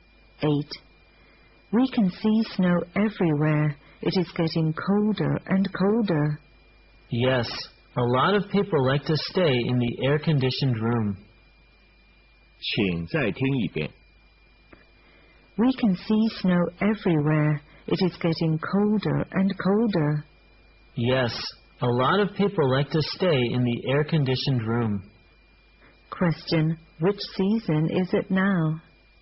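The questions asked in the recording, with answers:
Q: Which season is it now?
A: Winter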